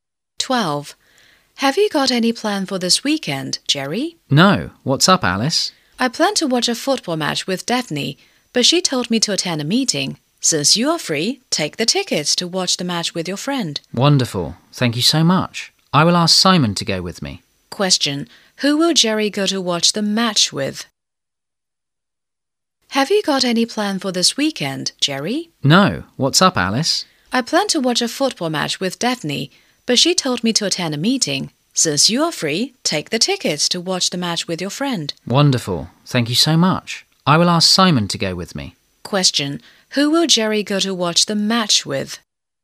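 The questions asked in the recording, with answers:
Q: Question, who will Jerry go to watch the match with?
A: Simon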